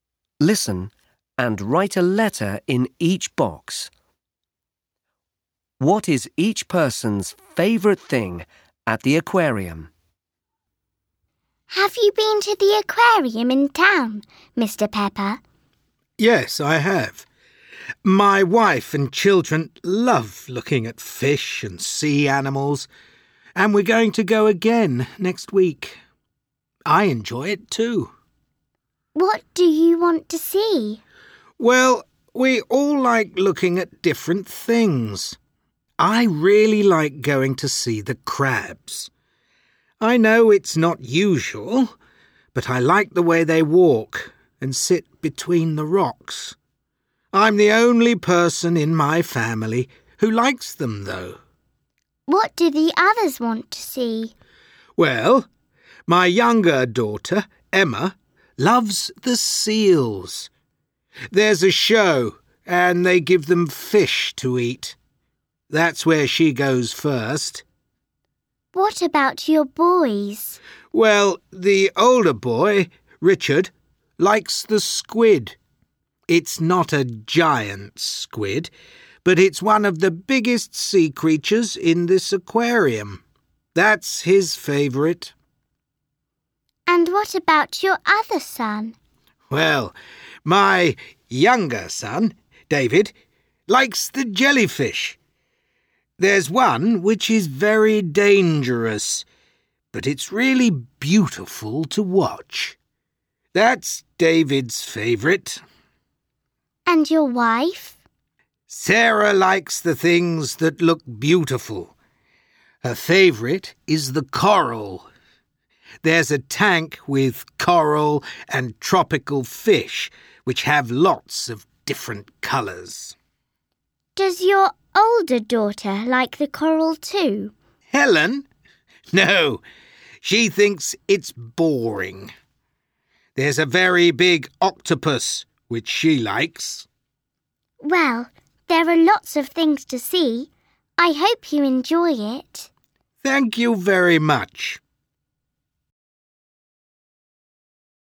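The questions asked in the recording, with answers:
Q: What is each person's favourite thing at the aquarium?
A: Mr Pepper: crabs; Emma: seals; Richard: squid; David: jellyfish; Sarah: coral; Helen: octopus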